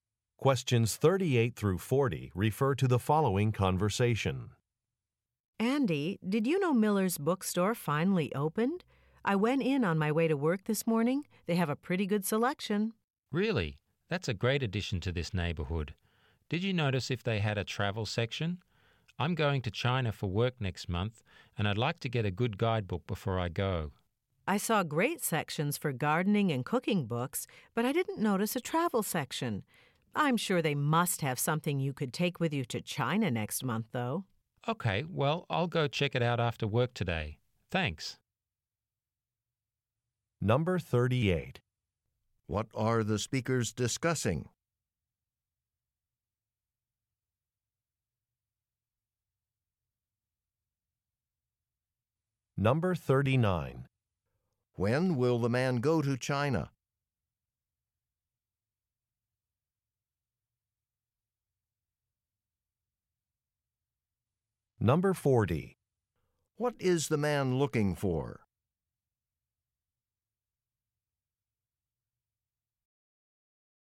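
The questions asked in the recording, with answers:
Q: What are the speakers discussing?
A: A newly opened bookstore

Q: When will the man go to China?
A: Next month

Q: What is the man looking for?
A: A travel guidebook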